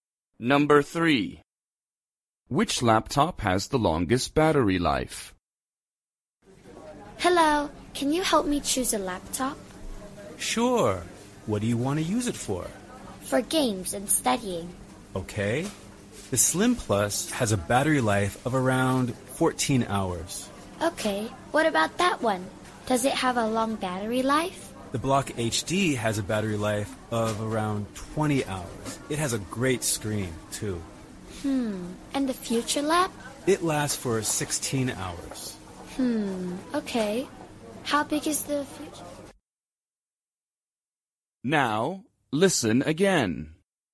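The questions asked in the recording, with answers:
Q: Which laptop has the longest battery life?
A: The Block HD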